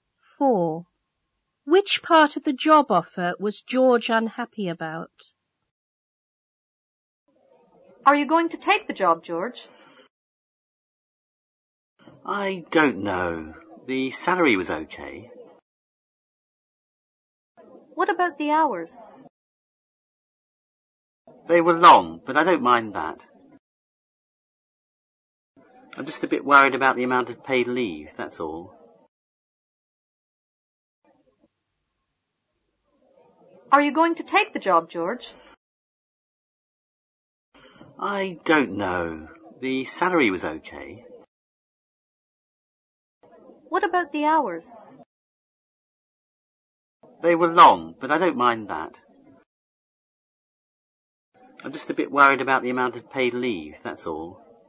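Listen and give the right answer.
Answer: The amount of paid leave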